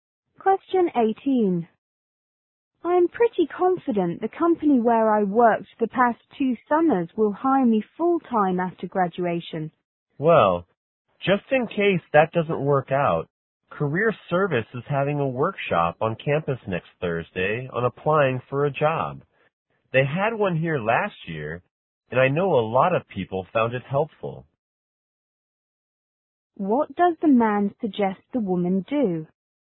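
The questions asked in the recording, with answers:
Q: What does the man suggest the woman do?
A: Attend the Career Service job-application workshop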